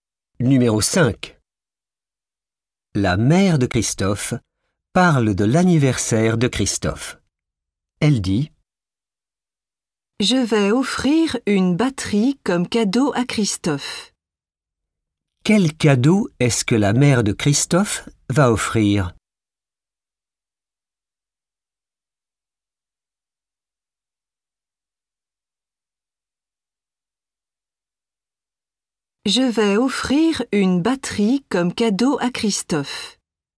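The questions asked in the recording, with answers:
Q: Quel cadeau est-ce que la mère de Christophe va offrir?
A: une batterie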